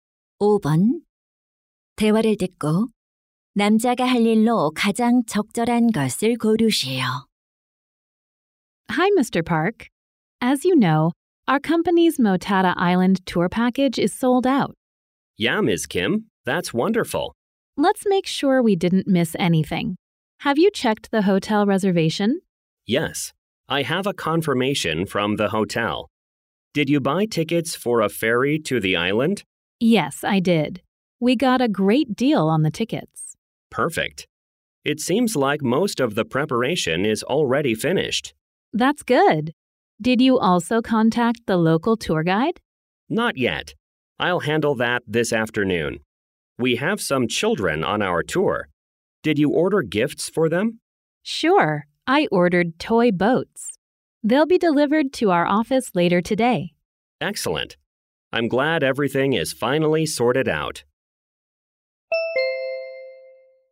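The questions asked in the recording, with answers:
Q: 대화를 듣고 남자가 할 일로 가장 적절한 것을 고르시오.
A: 현지 투어 가이드에게 연락하기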